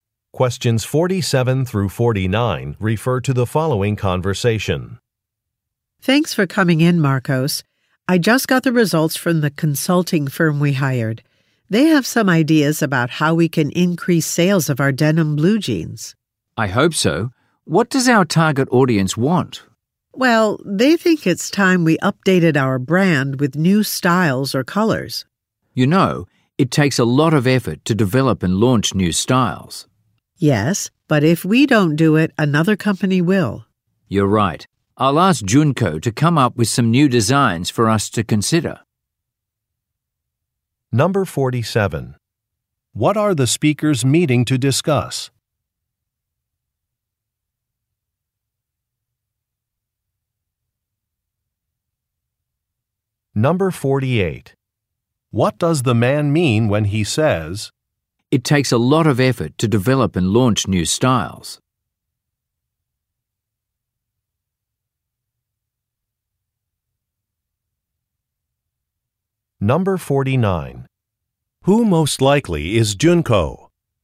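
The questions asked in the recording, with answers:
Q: What are the speakers meeting to discuss?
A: How to increase sales of their denim jeans (the consulting firm's results)

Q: Who most likely is Junko?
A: A designer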